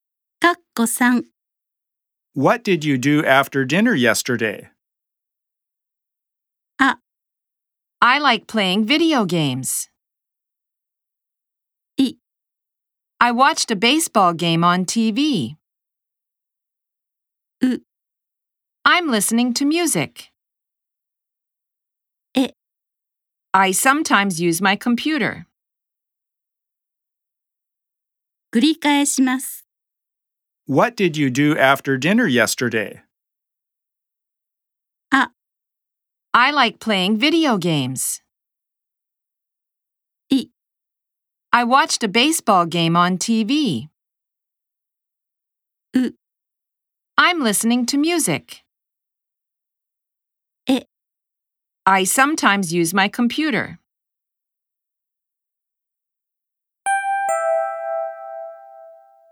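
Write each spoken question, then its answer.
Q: What did you do after dinner yesterday?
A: い: I watched a baseball game on TV.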